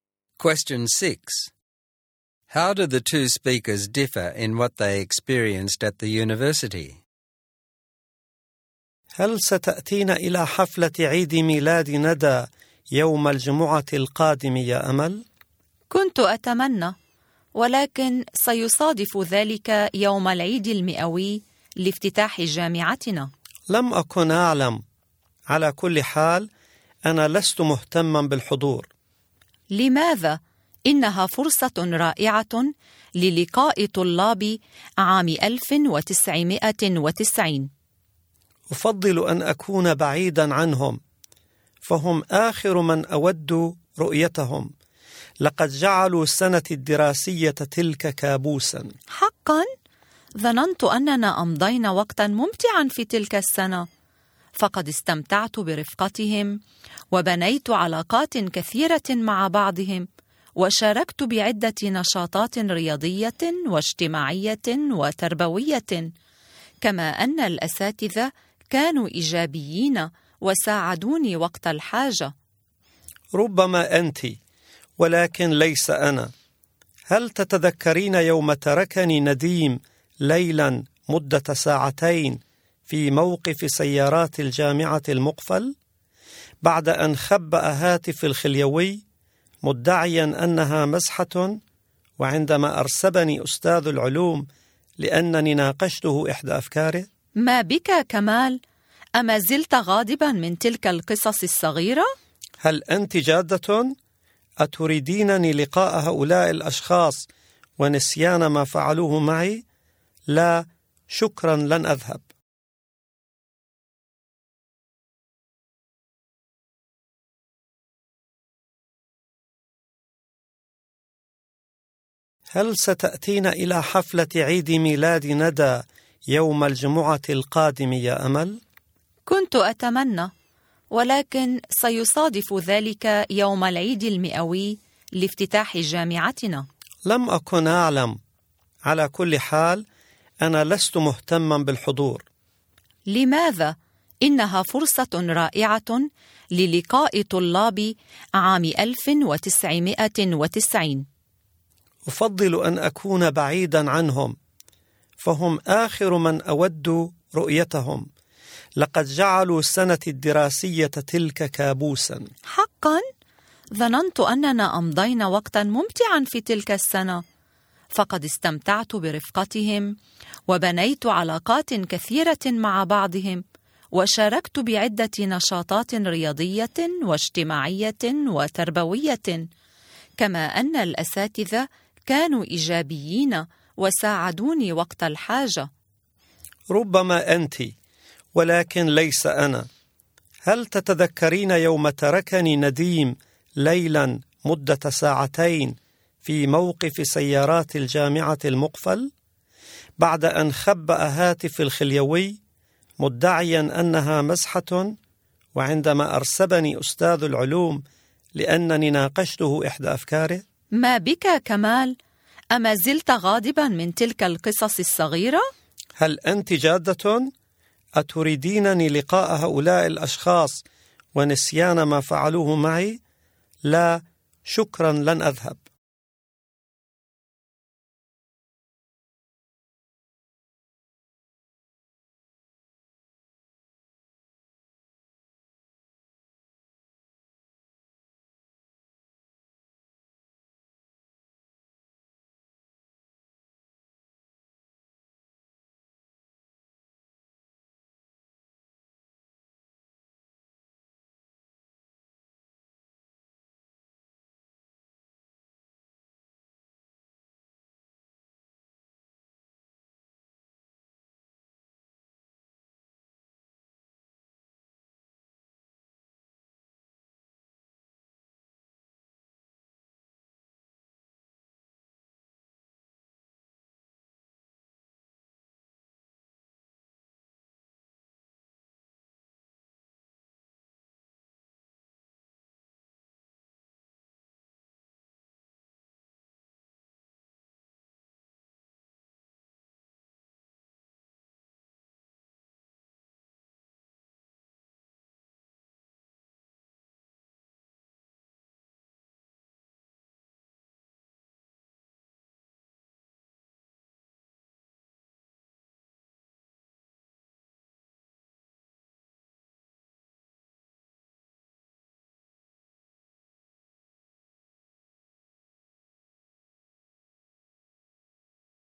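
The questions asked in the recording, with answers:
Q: How do the two speakers differ in what they experienced at the university?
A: Amal had a good time: she made friends, took part in activities and was helped by her teachers. Kamal had a nightmare year: Nadim played a prank that left him locked in the car park, and his science teacher failed him.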